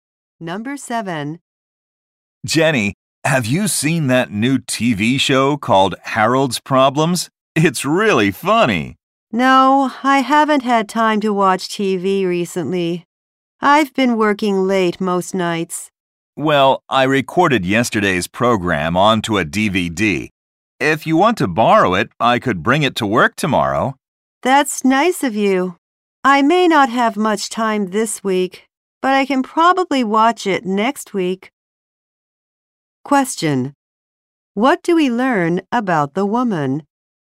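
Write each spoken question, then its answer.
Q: What do we learn about the woman?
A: She has been working late and hasn't had time to watch TV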